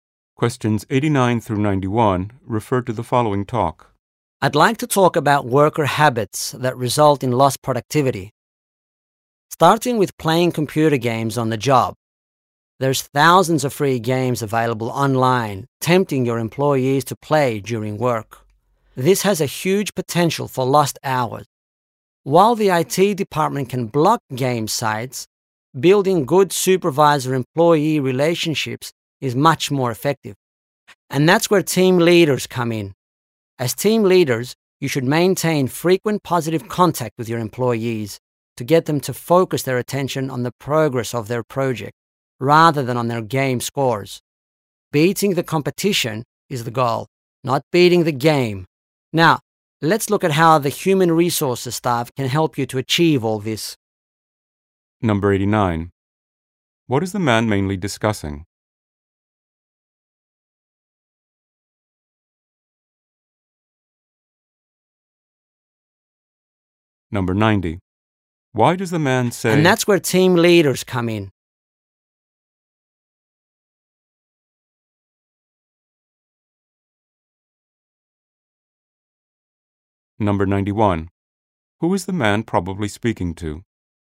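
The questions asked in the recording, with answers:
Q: What is the man mainly discussing?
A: Lost productivity from playing computer games at work

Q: Who is the man probably speaking to?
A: Team leaders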